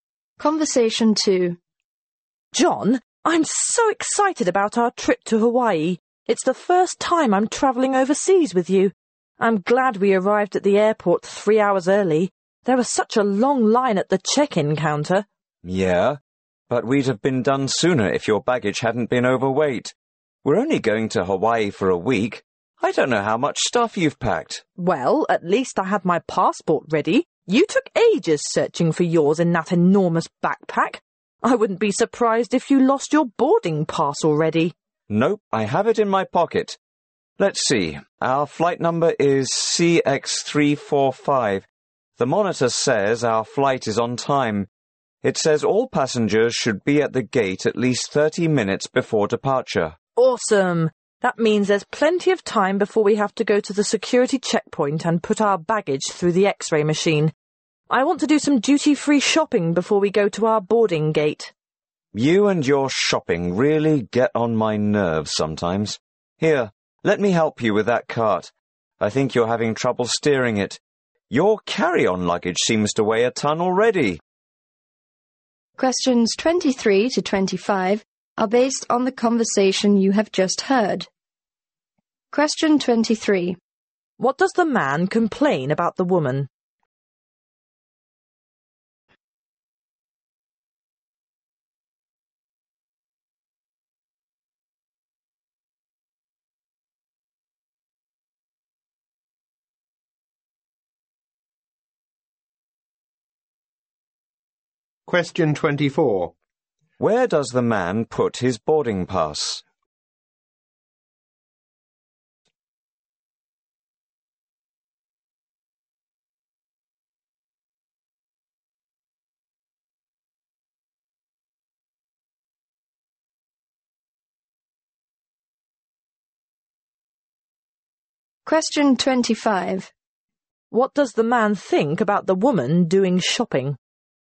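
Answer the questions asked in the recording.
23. Her baggage was overweight; she packed too much
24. In his pocket
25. It annoys him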